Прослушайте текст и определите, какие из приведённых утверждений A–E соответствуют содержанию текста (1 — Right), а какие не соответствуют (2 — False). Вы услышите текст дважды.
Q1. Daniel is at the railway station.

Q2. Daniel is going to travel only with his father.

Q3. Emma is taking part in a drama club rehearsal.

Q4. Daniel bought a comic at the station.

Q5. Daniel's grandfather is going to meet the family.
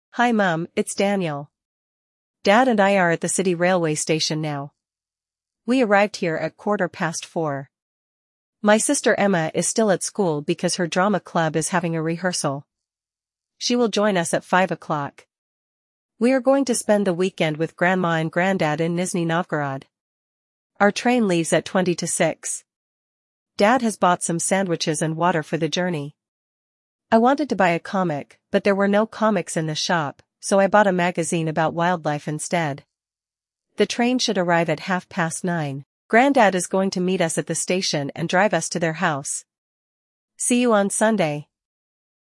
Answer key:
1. Right
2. False
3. Right
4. False
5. Right

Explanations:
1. Дэниел говорит, что находится на городском железнодорожном вокзале: We are at the city railway station now.
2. Вместе с Дэниелом и его отцом поедет Эмма. Она присоединится к ним в пять часов.
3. Эмма осталась в школе на репетиции драматического кружка.
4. Дэниел хотел купить комикс, но его не было в магазине. Вместо него он купил журнал о дикой природе.
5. Дедушка встретит семью на вокзале и отвезёт домой.

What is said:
Dad and I are at the city railway station now. We arrived here at quarter past four. My sister Emma is still at school because her drama club is having a rehearsal. She will join us at five o'clock.
We are going to spend the weekend with Grandma and Granddad in Nizhny Novgorod. Our train leaves at twenty to six. Dad has bought some sandwiches and water for the journey. I wanted to buy a comic, but there were no comics in the shop, so I bought a magazine about wildlife instead.
The train should arrive at half past nine. Granddad is going to meet us at the station and drive us to their house.
See you on Sunday!

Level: 6 класса